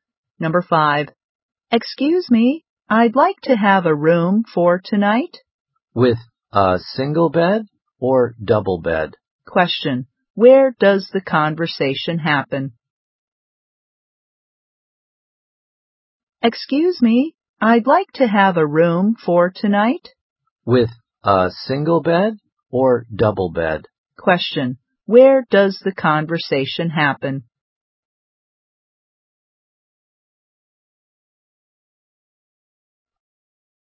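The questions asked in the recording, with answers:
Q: where does the conversation happen?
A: In a hotel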